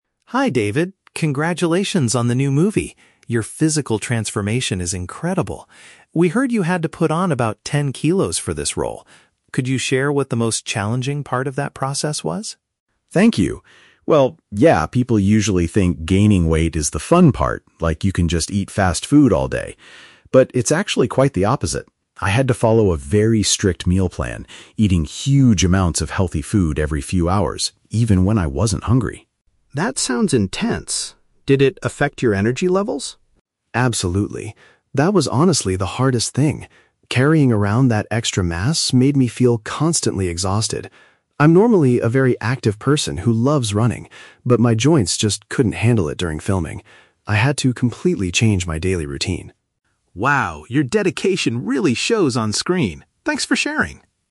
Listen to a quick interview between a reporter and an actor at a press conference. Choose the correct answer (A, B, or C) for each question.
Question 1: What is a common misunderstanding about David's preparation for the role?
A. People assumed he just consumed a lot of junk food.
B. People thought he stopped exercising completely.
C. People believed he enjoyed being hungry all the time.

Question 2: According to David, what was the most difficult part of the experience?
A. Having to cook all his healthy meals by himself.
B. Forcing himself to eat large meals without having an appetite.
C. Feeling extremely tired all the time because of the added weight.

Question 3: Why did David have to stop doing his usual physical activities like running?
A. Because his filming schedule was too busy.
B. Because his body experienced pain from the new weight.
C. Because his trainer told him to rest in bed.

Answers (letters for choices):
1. A
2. C
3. B

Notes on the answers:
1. David says people think "you can just eat fast food all day." (Fast food is a synonym/paraphrase for "junk food"). Why the traps are wrong: (C) is a trap. The audio mentions being hungry, but David says he had to eat "even when I wasn't hungry." (B) is a plausible assumption, but it is not mentioned as what people thought.
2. David states that "the hardest thing" was that the "extra mass made me feel constantly exhausted." (Exhausted means "extremely tired"). Why the traps are wrong: (B) is a trap. He does mention eating huge amounts of food when he wasn't hungry, but he specifically identifies feeling exhausted as "honestly the hardest thing." (A) is a plausible challenge, but cooking his own meals is never mentioned.
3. David says he loves running, but "my joints just couldn't handle it" due to the extra weight. This means his body could not support it and experienced pain. Why the traps are wrong: (A) is a trap. "Filming" is mentioned, but a busy schedule is not the reason he stopped running. (C) is a plausible reason for an actor, but a trainer is not mentioned in the dialogue.

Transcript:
Reporter: Hi David, congratulations on the new movie. Your physical transformation is incredible. We heard you had to put on about ten kilos for this role. Could you share what the most challenging part of that process was?
David: Thank you. Well, yeah, people usually think gaining weight is the fun part, like you can just eat fast food all day. But it's actually quite the opposite. I had to follow a very strict meal plan, eating huge amounts of healthy food every few hours, even when I wasn't hungry.
Reporter: That sounds intense. Did it affect your energy levels?
David: Absolutely. That was honestly the hardest thing. Carrying around that extra mass made me feel constantly exhausted. I'm normally a very active person who loves running, but my joints just couldn't handle it during filming. I had to completely change my daily routine.